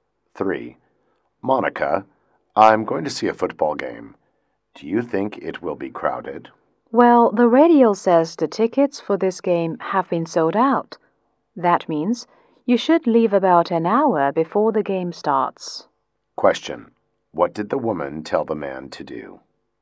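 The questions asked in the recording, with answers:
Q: What did the woman tell the man to do?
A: Leave about an hour before the game starts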